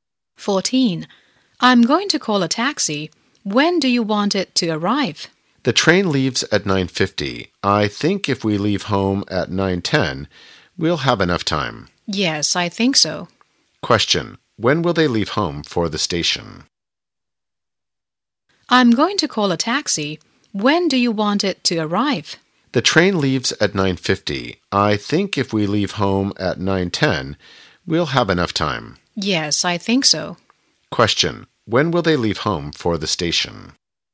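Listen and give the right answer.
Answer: At 9:10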